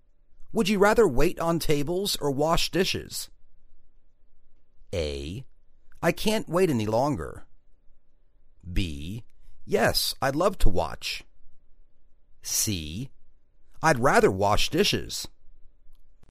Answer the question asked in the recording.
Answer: I'd rather wash dishes.